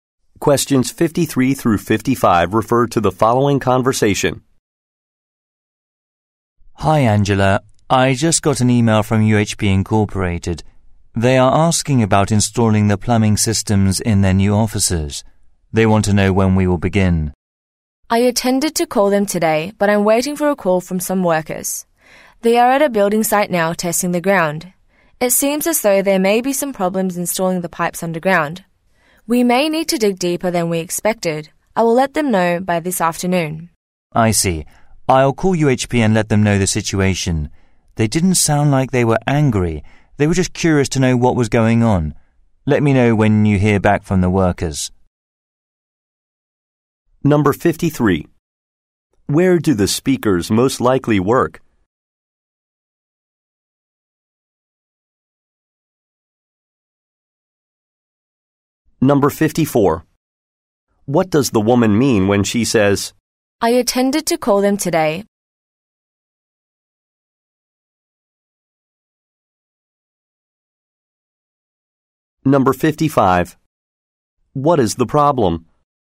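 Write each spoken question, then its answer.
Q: Where do the speakers most likely work?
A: At a plumbing installation company

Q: What is the problem?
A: There may be problems installing the pipes underground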